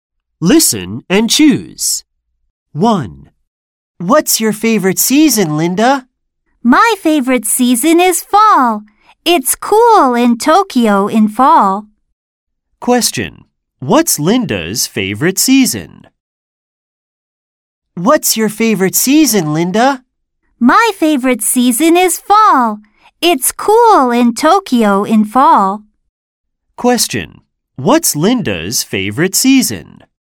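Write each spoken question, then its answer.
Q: What's Linda's favorite season?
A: fall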